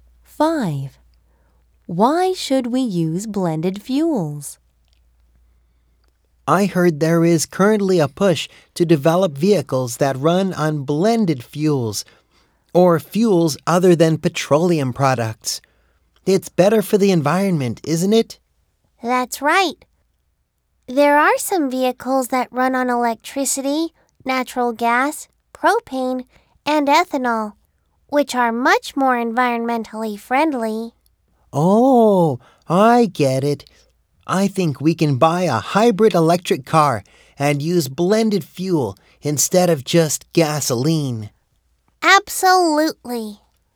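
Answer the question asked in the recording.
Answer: Because they are better for the environment.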